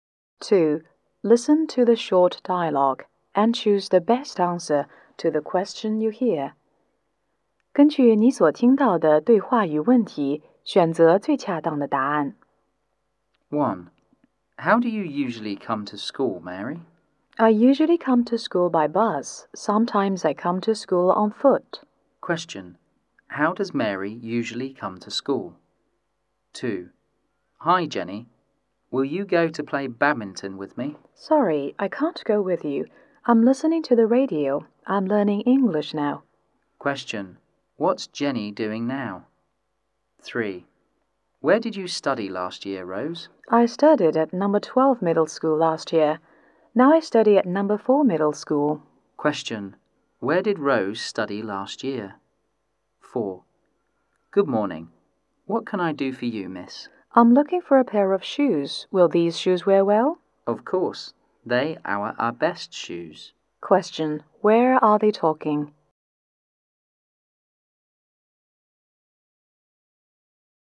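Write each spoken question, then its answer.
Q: Question. How does Mary usually come to school?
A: By bus

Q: Question. What's Jenny doing now?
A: Listening to the radio to learn English

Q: Question. Where did Rose study last year?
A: At No. 12 Middle School

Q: Question. Where are they talking?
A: In a shoe shop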